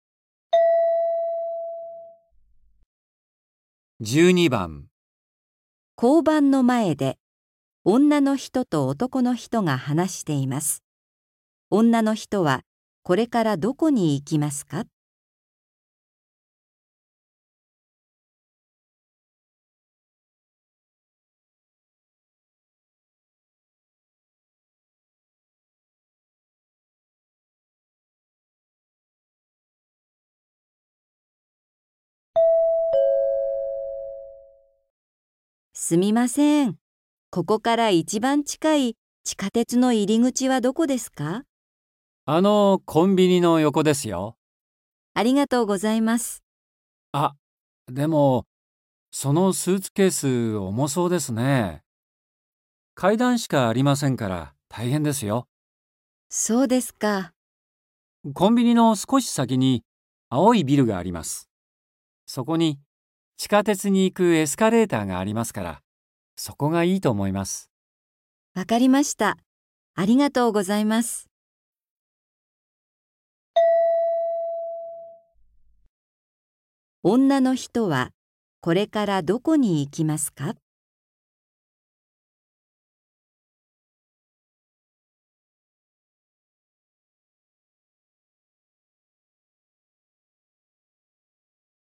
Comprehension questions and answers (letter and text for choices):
女の人は、これからどこに行きますか。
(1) コンビニ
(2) 青い ビル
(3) コンビニの 横の 階段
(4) 一番 近い 階段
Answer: (2) 青い ビル

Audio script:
F:すみません、ここから一番近い地下鉄の入口はどこですか。
M:あのコンビニの横ですよ。
F:ありがとうございます。
M:あ、でも、そのスーツケース、重そうですね。階段しかありませんから、大変ですよ。
M:コンビニの少し先に青いビルがあります。そこに地下鉄に行くエスカレーターがありますから、そこがいいと思います。

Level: N4